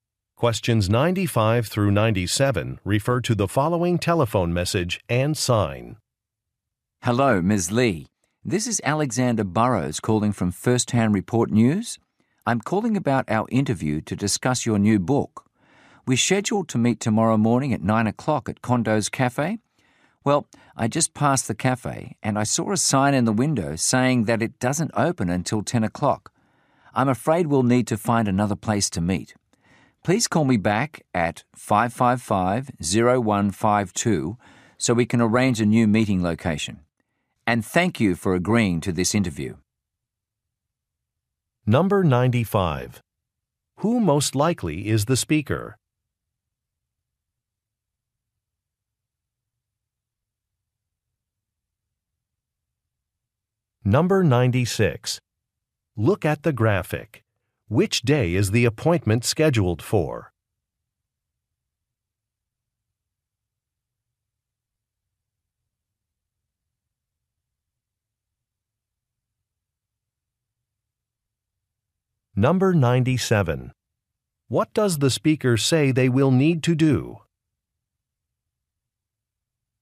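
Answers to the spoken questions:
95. A news reporter
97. Find another place to meet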